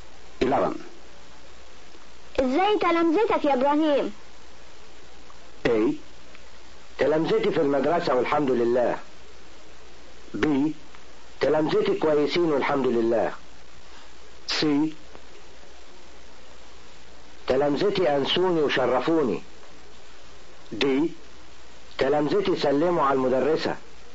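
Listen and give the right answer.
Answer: B: تلمذتي كويسين والحمد لله.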